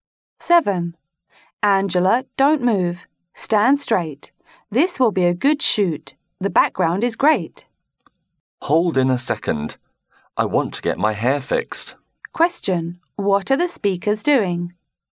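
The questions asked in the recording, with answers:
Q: What are the speakers doing?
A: Taking photos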